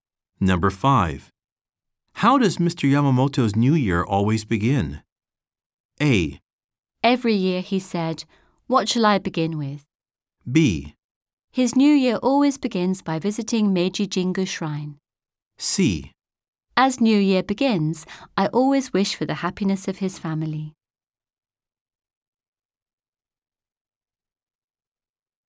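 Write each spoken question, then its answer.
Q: How does Mr. Yamamoto's New Year always begin?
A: B: His new year always begins by visiting Meiji Jingu Shrine.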